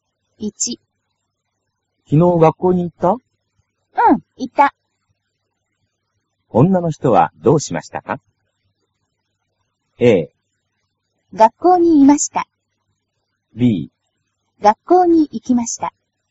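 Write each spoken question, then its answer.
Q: 女の人はどうしましたか?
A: B: 学校に行きました。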